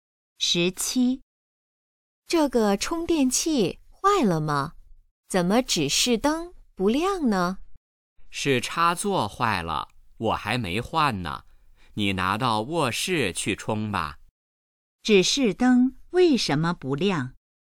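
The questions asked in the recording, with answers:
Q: 指示灯为什么不亮?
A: 插座坏了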